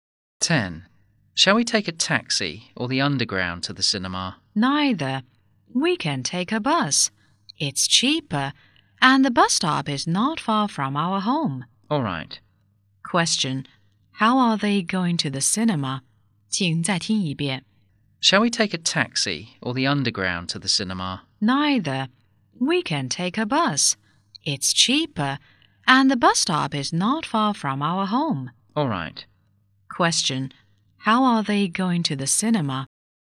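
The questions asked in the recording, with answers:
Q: How are they going to the cinema?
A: By bus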